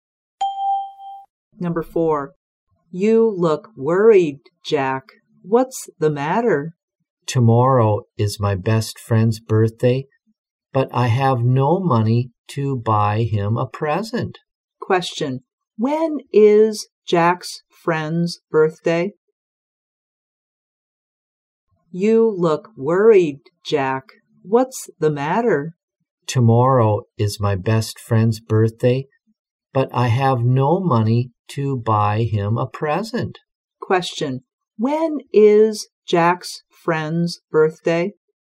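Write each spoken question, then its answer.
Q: When is Jack's friend's birthday?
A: Tomorrow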